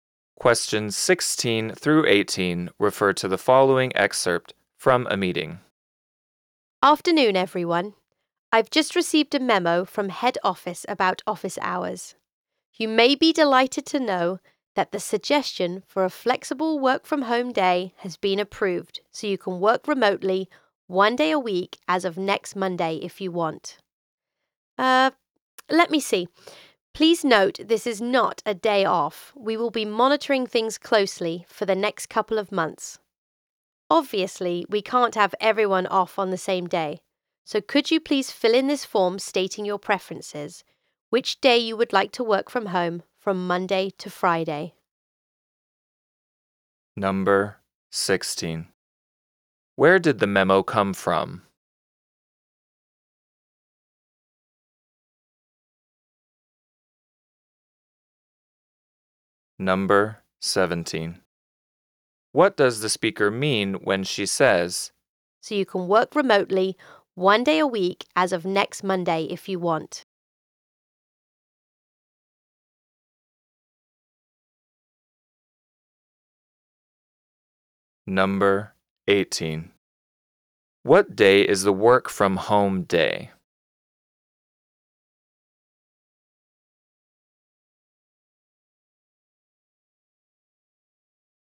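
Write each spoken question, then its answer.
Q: Where did the memo come from?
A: From head office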